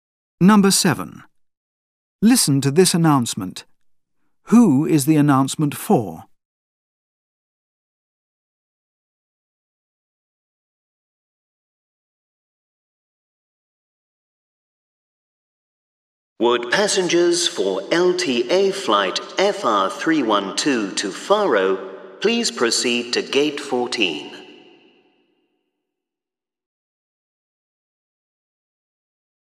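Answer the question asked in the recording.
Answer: Passengers on flight FR312 to Faro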